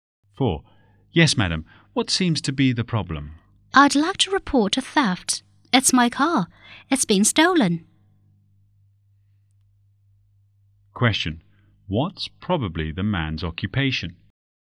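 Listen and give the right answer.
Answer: Police officer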